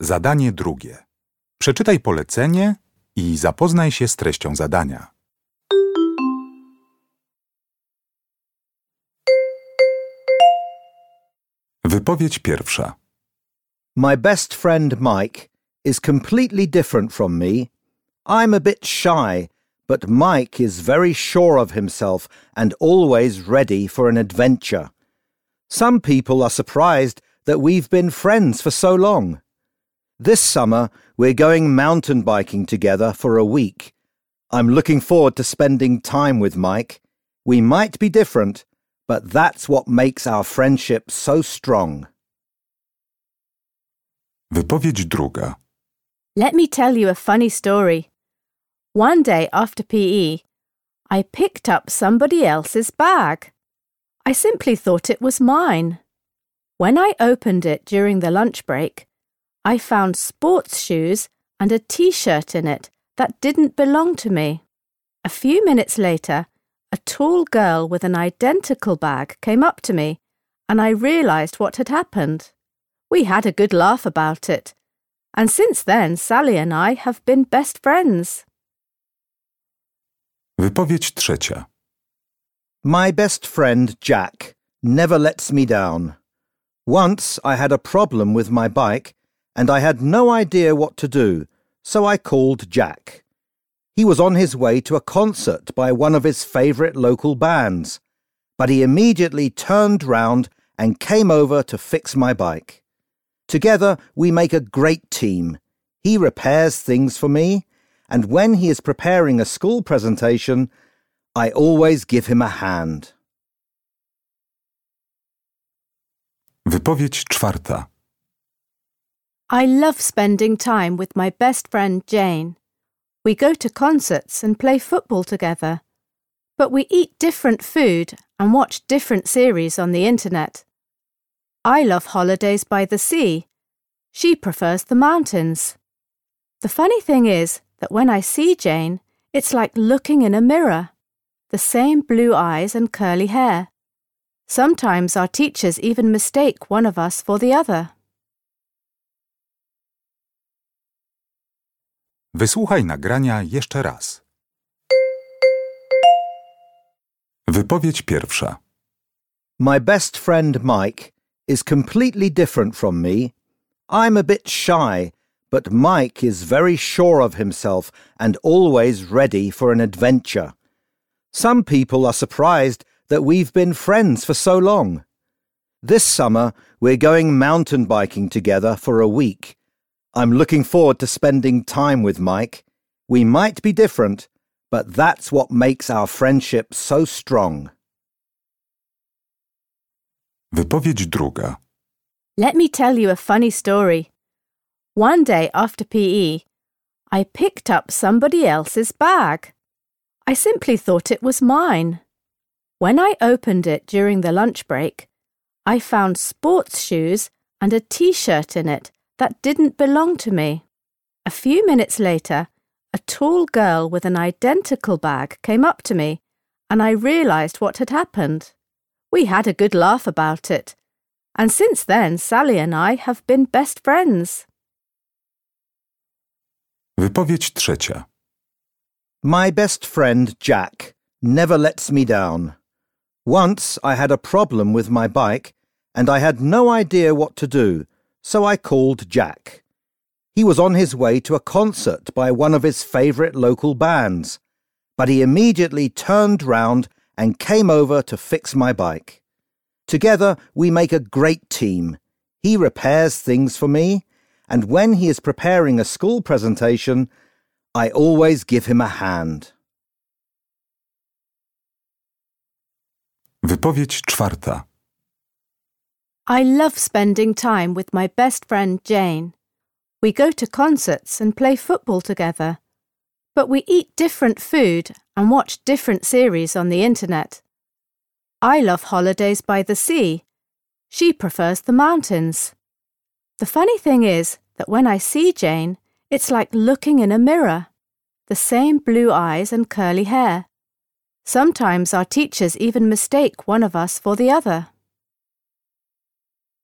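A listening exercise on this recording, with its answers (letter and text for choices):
Uruchamiając odtwarzacz z oryginalnym nagraniem CKE usłyszysz dwukrotnie cztery wypowiedzi na temat najlepszych przyjaciół. Na podstawie informacji zawartych w nagraniu dopasuj do każdej wypowiedzi (2.1.–2.4.) odpowiadające jej zdanie (A–E).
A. My best friend changed his plans to help me.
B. I went to my best friend's concert.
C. I'm planning to go on holiday with my best friend.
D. A mistake I made started our friendship.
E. My best friend and I look very similar.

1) 2.1.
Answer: C. I'm planning to go on holiday with my best friend.

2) 2.2.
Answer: D. A mistake I made started our friendship.

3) 2.3.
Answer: A. My best friend changed his plans to help me.

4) 2.4.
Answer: E. My best friend and I look very similar.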